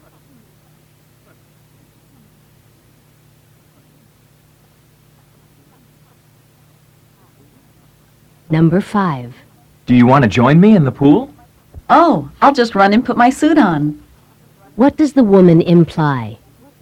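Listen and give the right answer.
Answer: She will join him in the pool after putting on her swimsuit.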